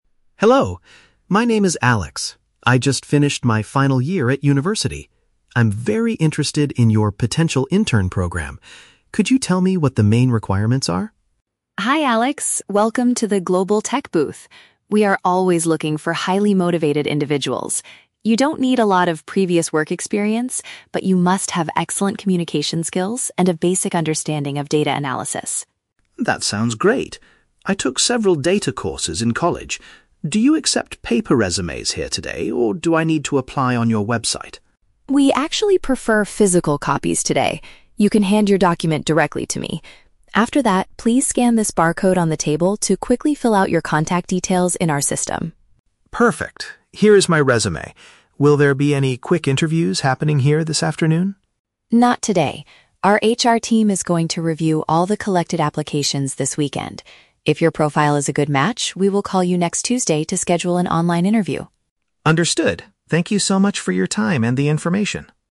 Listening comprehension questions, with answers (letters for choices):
Listen to a conversation between a recent graduate and a company representative at a job fair. Choose the best answer (A, B, or C) for each question.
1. What kind of qualifications does the company require for the intern program?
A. Many years of professional management experience.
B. The ability to interact well and basic knowledge of data.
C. A master's degree in a technology-related field.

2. How does Sarah instruct Alex to submit his application at the fair?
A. By sending a digital copy of his resume to her email address.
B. By completing a long paper registration form at the booth.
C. By giving her his printed document and using a digital code.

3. When will the company reach out to the candidates who pass the first round?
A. Later this afternoon at the event.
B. Sometime during the upcoming weekend.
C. On the following Tuesday.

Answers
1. B
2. C
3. C

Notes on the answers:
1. Sarah states that candidates must have "excellent communication skills" and a "basic understanding of data analysis." Paraphrasing: communication skills = ability to interact well; understanding = knowledge.
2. Sarah tells Alex to hand her his "physical copies" (printed document) and then "scan this barcode" (digital code) to fill out his details.
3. Sarah mentions that if his profile is a good match, they will "call you next Tuesday" to schedule the interview.

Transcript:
Alex: Hello! My name is Alex. I just finished my final year at university. I'm very interested in your Potential Intern program. Could you tell me what the main requirements are?
Sarah: Hi Alex, welcome to the Global Tech booth! We are always looking for highly motivated individuals. You don't need a lot of previous work experience, but you must have excellent communication skills and a basic understanding of data analysis.
Alex: That sounds great. I took several data courses in college. Do you accept paper resumes here today, or do I need to apply on your website?
Sarah: We actually prefer physical copies today. You can hand your document directly to me. After that, please scan this barcode on the table to quickly fill out your contact details in our system.
Alex: Perfect. Here is my resume. Will there be any quick interviews happening here this afternoon?
Sarah: Not today. Our HR team is going to review all the collected applications this weekend. If your profile is a good match, we will call you next Tuesday to schedule an online interview.